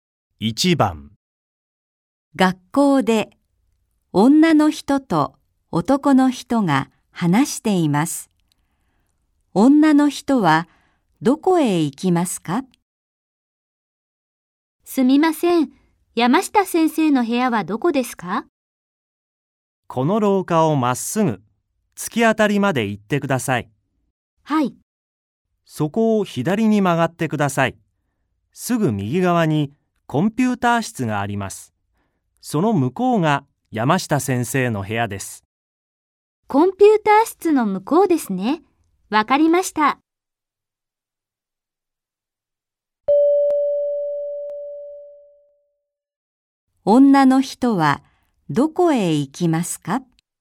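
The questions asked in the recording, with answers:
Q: 女の人はどこへ行きますか?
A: 山下先生の部屋(コンピューター室の向こう)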